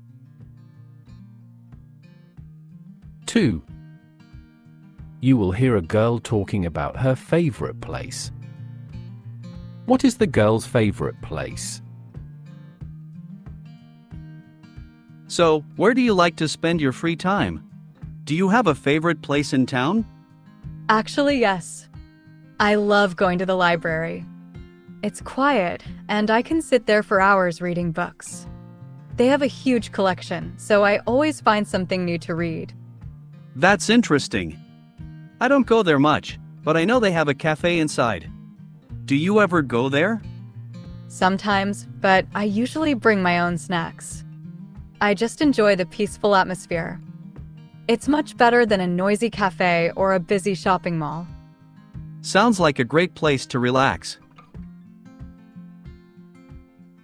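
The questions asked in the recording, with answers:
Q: What is the girl's favorite place?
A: the library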